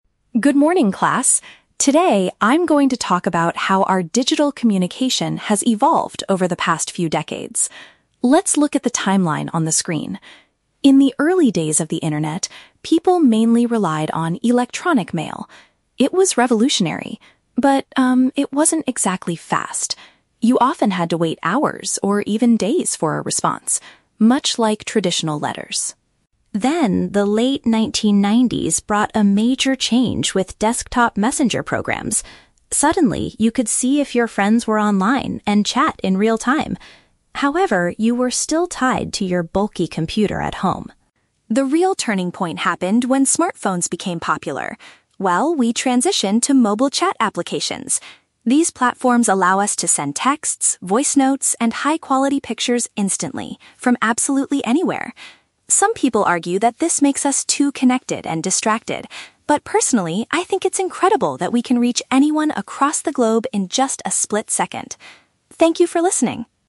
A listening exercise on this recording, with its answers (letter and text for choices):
Listen to a student giving a short presentation in class. For each question, choose the correct answer (A, B, or C).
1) What was a major disadvantage of early electronic mail?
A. It was primarily used to send handwritten paper letters.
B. Replies could take a considerable amount of time to arrive.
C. It was too complicated for ordinary people to use.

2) What was the main limitation of the messenger programs in the late 1990s?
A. Users could only access them from a stationary machine.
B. People were unable to see if their contacts were available.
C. They did not allow for instant, real-time conversations.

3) What is the speaker's personal opinion on modern mobile chat applications?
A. She believes they cause people to lose focus too easily.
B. She feels overwhelmed by the number of high-quality pictures.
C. She appreciates the ability to contact people worldwide immediately.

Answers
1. B. Replies could take a considerable amount of time to arrive.
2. A. Users could only access them from a stationary machine.
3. C. She appreciates the ability to contact people worldwide immediately.

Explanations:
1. The speaker says that with early email, you "had to wait hours or even days for a response," which means replies took a considerable amount of time. Option (A) is a trap; she compares email to "traditional letters," but email itself is not paper. Option (C) is plausible for early internet, but it is not mentioned in the audio.
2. The speaker mentions that you were "tied to your bulky computer at home," which means you had to use a stationary machine. Options (B) and (C) are traps; the speaker explicitly states that these programs did allow you to "see if your friends were online" and "chat in real time."
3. The speaker says, "I think it's incredible that we can reach anyone across the globe in just a split second" (contact people worldwide immediately). Option (A) is a trap; she mentions that "Some people argue" that apps make us "distracted" (lose focus), but she says "personally" her opinion is different. Option (B) is a trap; she mentions pictures, but does not say she feels overwhelmed by them.

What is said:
Student: Good morning, class. Today, I'm going to talk about how our digital communication has evolved over the past few decades. Let's look at the timeline on the screen. In the early days of the internet, people mainly relied on electronic mail. It was revolutionary, but, um, it wasn't exactly fast. You often had to wait hours or even days for a response, much like traditional letters.
Then, the late 1990s brought a major change with desktop messenger programs. Suddenly, you could see if your friends were online and chat in real time. However, you were still tied to your bulky computer at home.
The real turning point happened when smartphones became popular. Well, we transitioned to mobile chat applications. These platforms allow us to send texts, voice notes, and high-quality pictures instantly, from absolutely anywhere. Some people argue that this makes us too connected and distracted. But personally, I think it's incredible that we can reach anyone across the globe in just a split second. Thank you for listening.